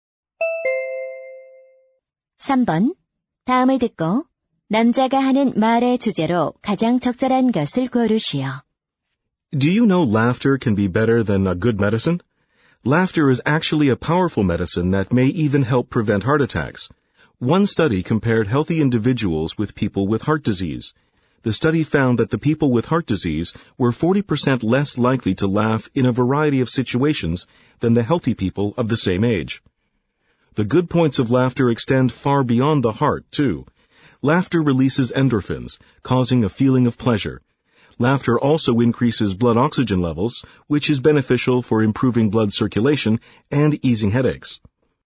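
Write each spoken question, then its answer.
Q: 다음을 듣고 남자가 하는 말의 주제로 가장 적절한 것을 고르시오.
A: 웃음이 건강에 주는 이점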